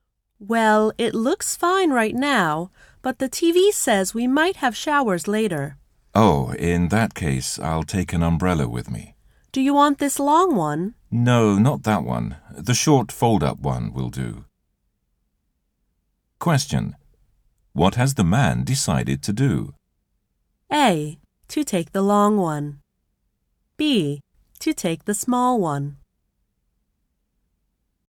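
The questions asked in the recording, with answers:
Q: What has the man decided to do?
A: B: To take the small one.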